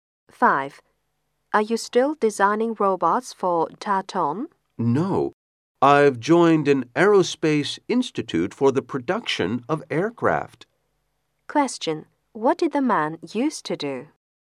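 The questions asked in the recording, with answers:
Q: What did the man used to do?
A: Design robots for Tatton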